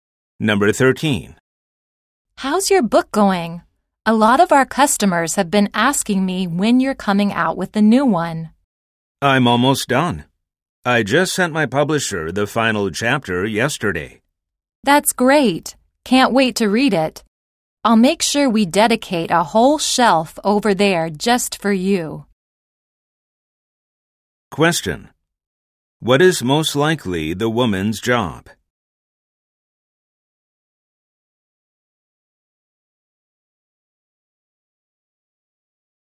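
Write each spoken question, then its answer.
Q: What is most likely the woman's job?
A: Bookstore employee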